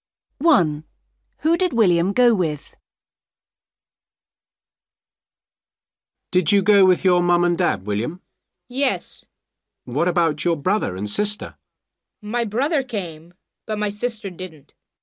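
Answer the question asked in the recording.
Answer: His mum, dad and brother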